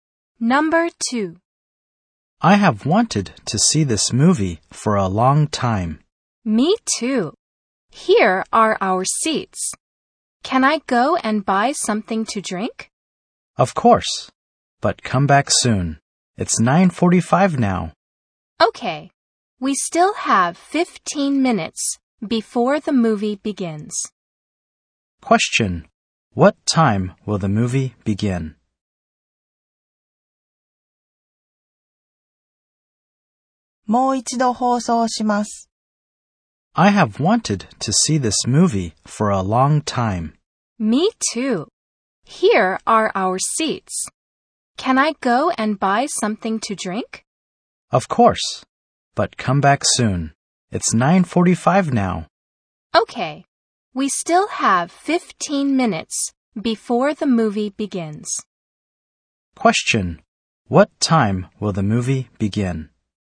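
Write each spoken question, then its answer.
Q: What time will the movie begin?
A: At 10:00.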